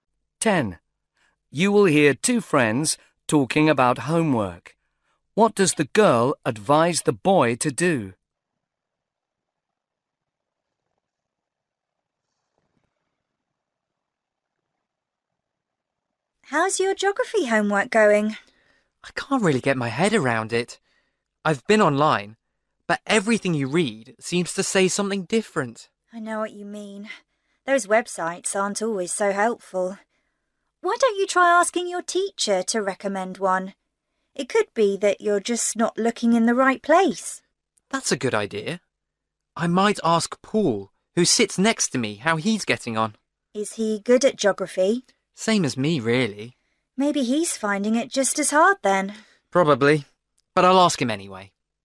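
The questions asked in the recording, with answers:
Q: What does the girl advise the boy to do?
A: Ask his teacher to recommend a website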